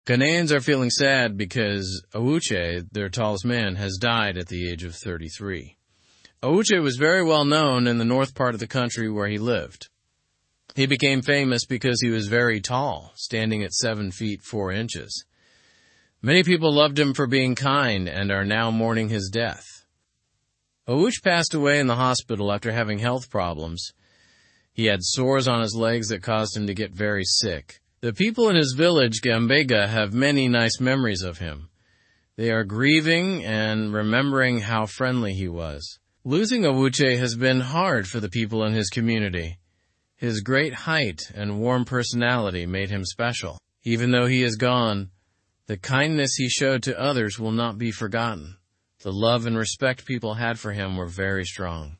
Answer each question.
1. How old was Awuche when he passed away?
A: He was 33 years old.

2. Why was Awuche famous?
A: He was famous for being very tall and kind.

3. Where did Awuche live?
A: He lived in the north of Ghana, in a place called Gambaga.

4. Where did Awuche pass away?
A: He passed away in the hospital.

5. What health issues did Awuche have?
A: He had complications from sores on his legs.

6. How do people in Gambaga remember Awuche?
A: They remember him fondly and are sad about his death.

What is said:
Ghanaians are feeling sad because Awuche, their tallest man, has died at the age of 33. Awuche was very well-known in the north part of the country where he lived. He became famous because he was very tall, standing at 7 feet 4 inches. Many people loved him for being kind and are now mourning his death. Awuche passed away in the hospital after having health problems. He had sores on his legs that caused him to get very sick. The people in his village, Gambaga, have many nice memories of him. They are grieving and remembering how friendly he was. Losing Awuche has been hard for the people in his community. His great height and warm personality made him special. Even though he is gone, the kindness he showed to others will not be forgotten. The love and respect people had for him were very strong.

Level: Level 2